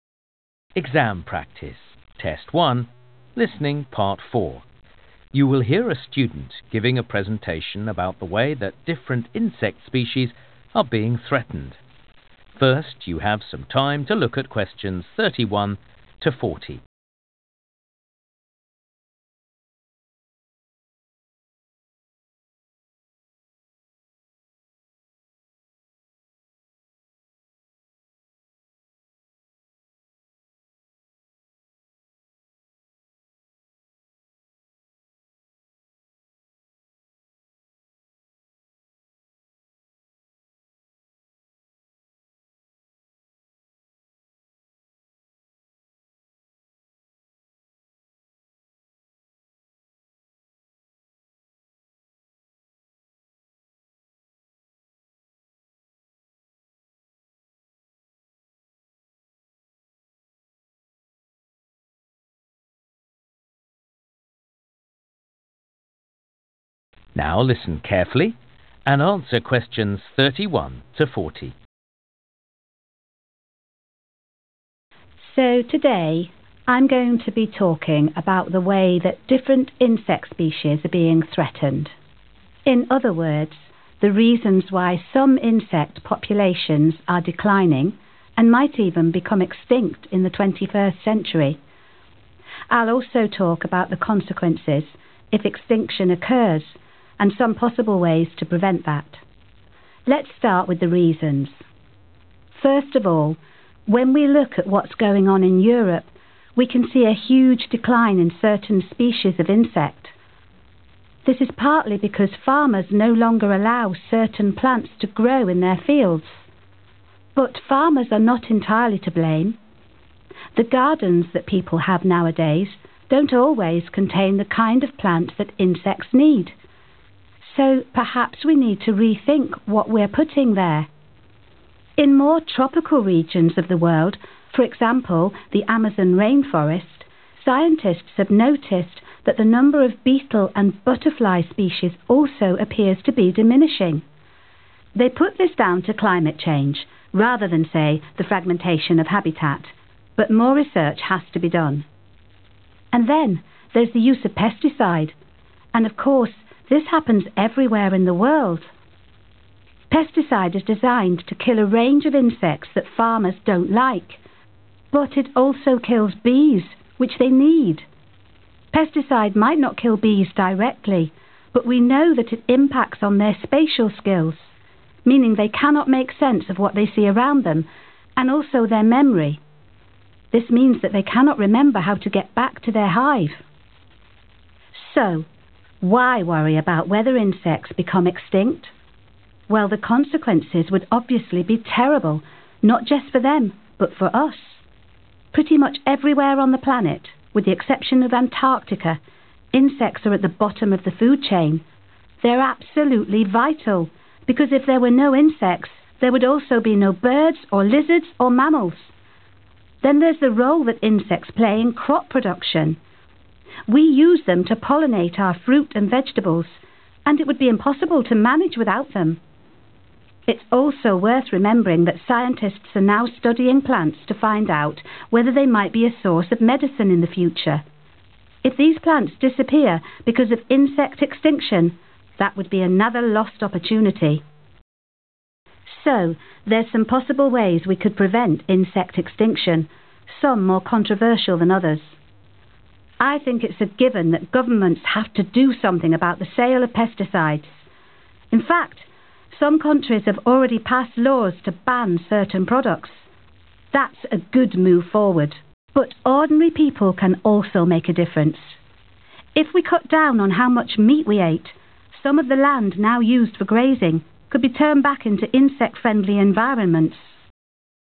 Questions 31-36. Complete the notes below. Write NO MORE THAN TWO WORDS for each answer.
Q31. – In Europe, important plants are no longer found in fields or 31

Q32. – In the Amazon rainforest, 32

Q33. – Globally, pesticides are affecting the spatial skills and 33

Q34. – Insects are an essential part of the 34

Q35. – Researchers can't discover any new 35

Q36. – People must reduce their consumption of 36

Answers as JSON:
{"31": "gardens", "32": "climate change", "33": "memory", "34": "food chain", "35": "medicine", "36": "meat"}

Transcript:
Student: So today I'm going to be talking about the way that different insect species are being threatened. In other words, the reasons why some insect populations are declining – and might even become extinct in the 21st century. I'll also talk about the consequences – if extinction occurs – and some possible ways to prevent that.
Let's start with the reasons. First of all, when we look at what's going on in Europe, we can see a huge decline in certain species of insect. (Q31) This is partly because farmers no longer allow certain plants (=important plants) to grow in their fields. But farmers are not entirely to blame. The gardens that people have nowadays don't always contain the kind of plant that insects need. So perhaps we need to rethink what we're putting there. (Q32) In more tropical regions of the world, for example, the Amazon rainforest, scientists have noticed that the number of beetle and butterfly species also appears to be diminishing (=loss). They put this down to climate change, rather than say, the fragmentation of habitat – but more research has to be done. And then, there's the use of pesticide, and of course, this happens everywhere in the world. Pesticide is designed to kill a range of insects that farmers don't like, but it also kills bees, which they need. (Q33) Pesticide might not kill bees directly, but we know that it impacts on their spatial skills – meaning they cannot make sense of what they see around them – and also their memory. This means that they cannot remember how to get back to their hive.
So why worry about whether insects become extinct? Well, the consequences would obviously be terrible not just for them, but for us. (Q34) Pretty much everywhere on the planet, with the exception of Antarctica, insects are at the bottom of the food chain. They're absolutely vital (=essential part), because if there were no insects, there would also be no birds or lizards or mammals. Then there's the role that insects play in crop production. We use them to pollinate our fruit and vegetables, and it would be impossible to manage without them. If these plants disappear because of insect extinction, that would be another lost opportunity. So, there's some possible ways we could prevent insect extinction, some more controversial than others. I think it's a given that governments have to do something about the sale of pesticides; in fact, some countries have already passed laws to ban certain products. That's a good move forward. But ordinary people can also make a difference. (Q36) If we cut down (=reduce) on how much meat we ate (=consumption), some of the land now used for grazing could be turned back into insect-friendly environments.